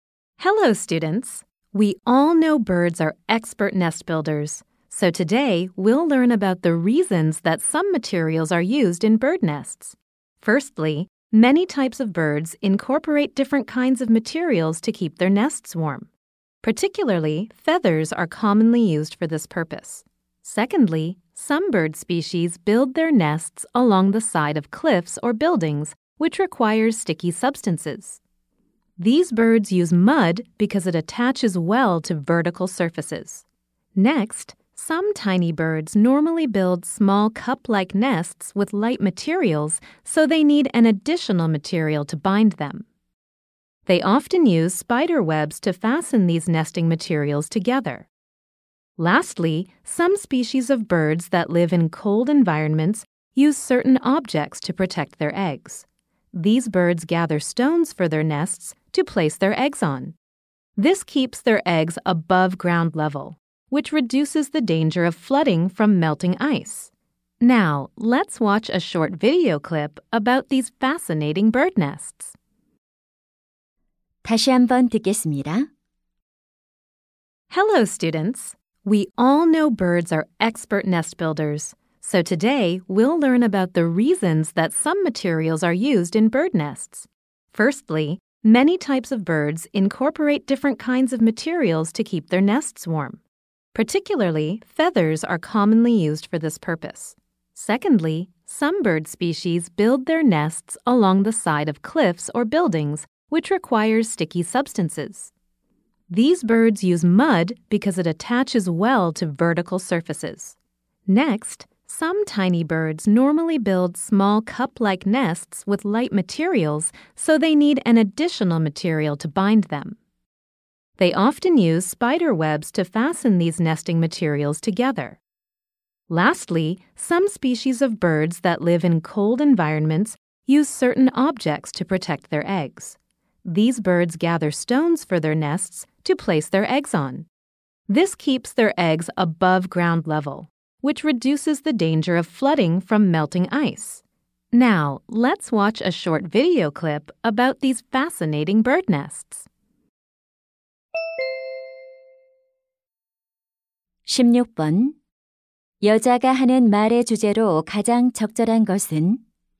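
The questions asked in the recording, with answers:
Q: 여자가 하는 말의 주제로 가장 적절한 것은?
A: 새들이 둥지에 특정 재료를 사용하는 이유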